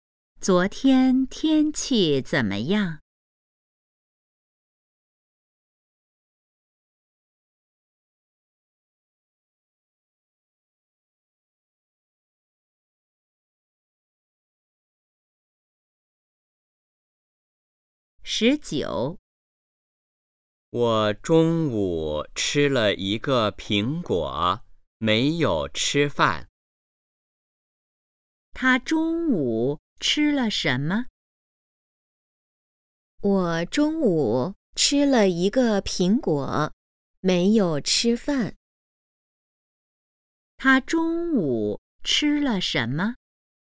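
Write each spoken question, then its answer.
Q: 他中午吃了什么?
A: 一个苹果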